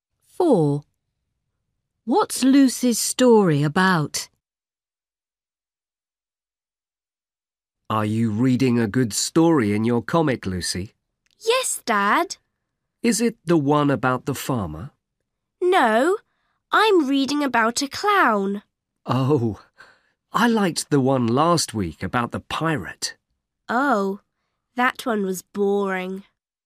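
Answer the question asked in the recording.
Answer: a clown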